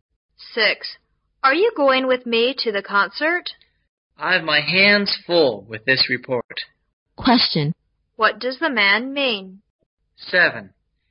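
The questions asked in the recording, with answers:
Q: What does the man mean?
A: He is too busy with his report to go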